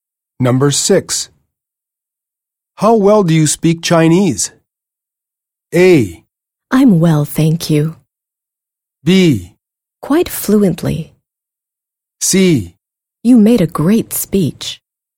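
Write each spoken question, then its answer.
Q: How well do you speak Chinese?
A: B: Quite fluently.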